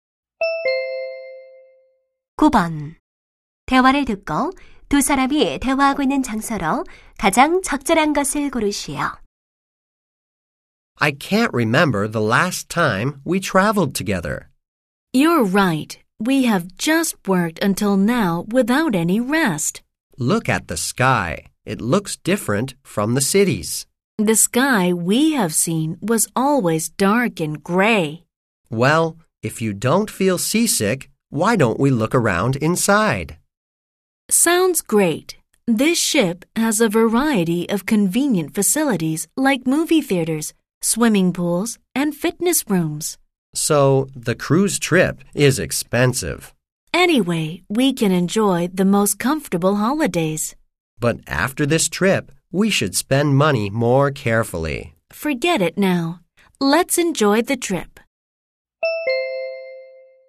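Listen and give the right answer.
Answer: 유람선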